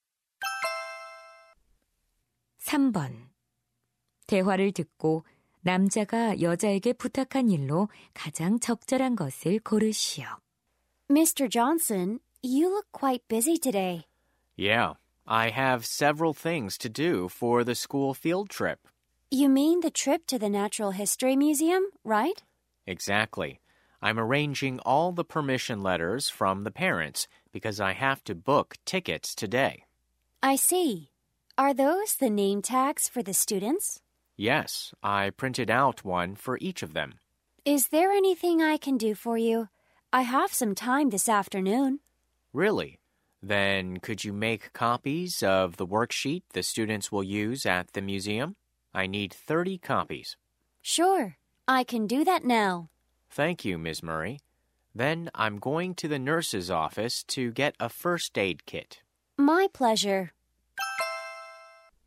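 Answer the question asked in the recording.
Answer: 학습지 30부 복사하기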